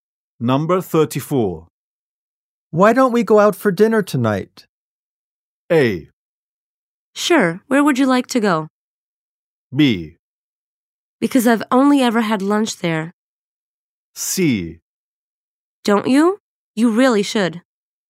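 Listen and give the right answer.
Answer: A: Sure, where would you like to go?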